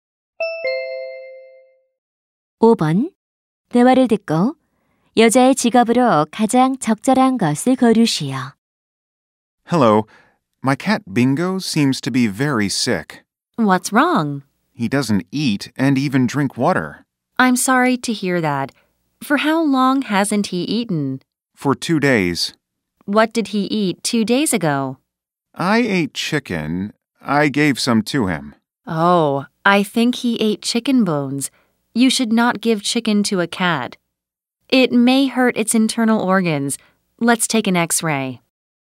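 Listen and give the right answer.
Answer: 수의사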